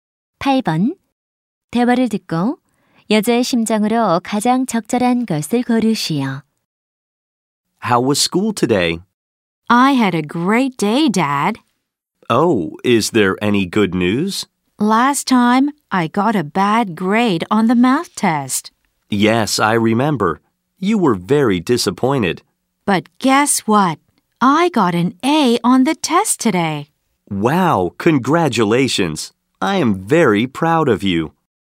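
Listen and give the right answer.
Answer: 기쁨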